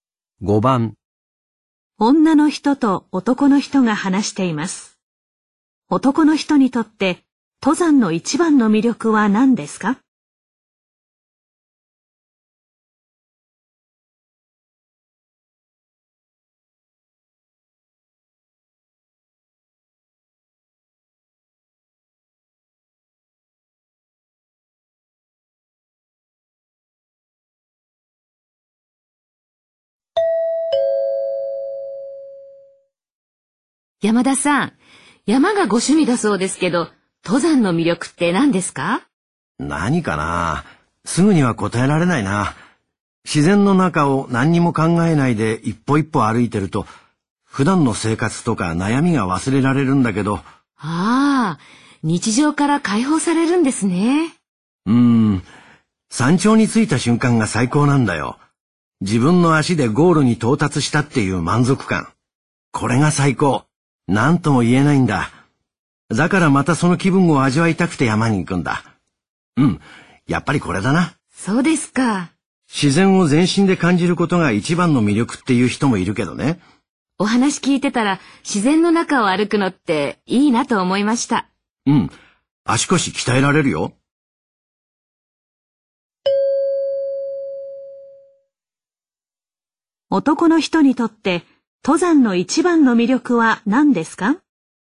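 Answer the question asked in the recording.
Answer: 山頂に着いたときの満足感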